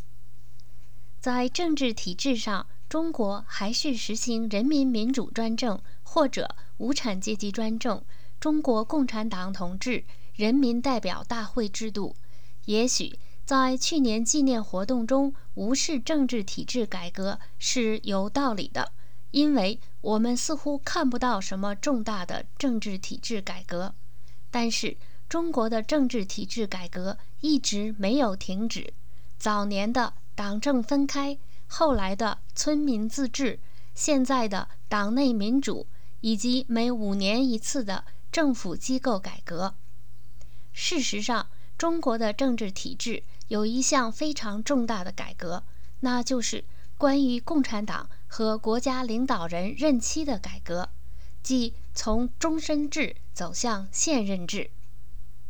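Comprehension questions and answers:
Please answer the following questions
What political reforms have been carried out in China during the 30 years of its reform?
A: Separating the Party from the government, village self-government, democracy within the Party, government restructuring every five years, and ending lifelong tenure in favour of fixed terms

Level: M.Phil Year 2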